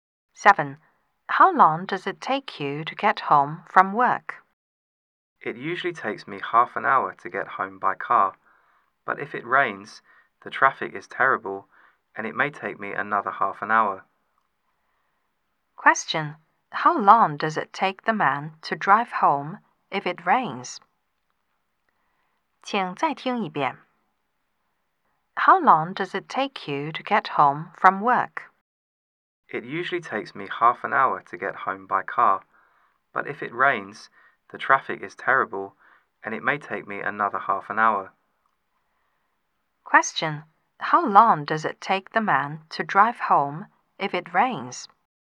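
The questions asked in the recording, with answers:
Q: How long does it take the man to drive home if it rains?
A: One hour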